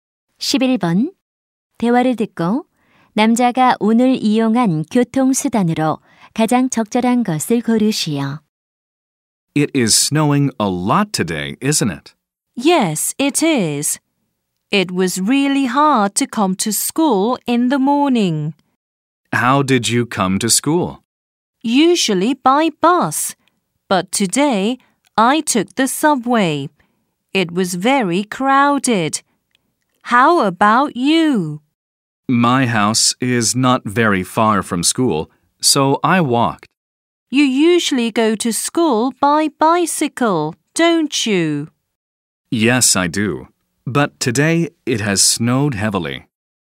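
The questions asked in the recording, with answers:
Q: 대화를 듣고 남자가 오늘 이용한 교통수단으로 가장 적절한 것을 고르시오.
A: 지하철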